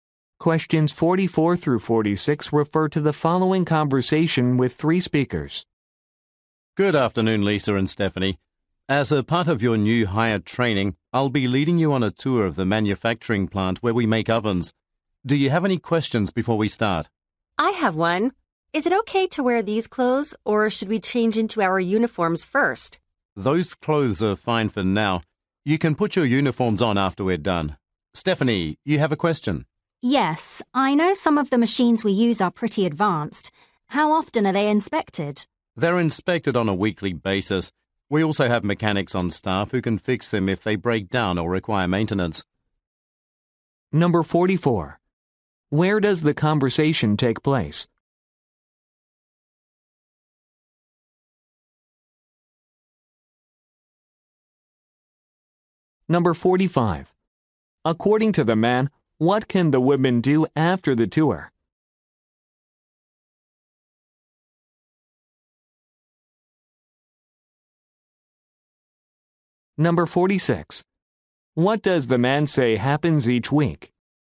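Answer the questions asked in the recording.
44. At a manufacturing plant that makes ovens
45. Put on their uniforms
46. The machines are inspected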